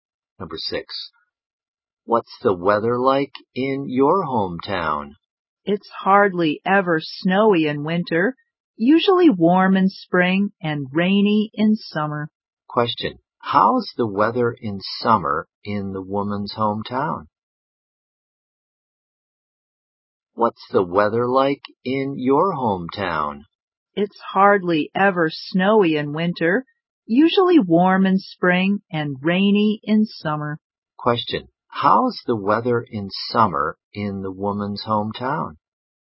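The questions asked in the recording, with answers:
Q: Question. How's the weather in summer in the woman's hometown?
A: Rainy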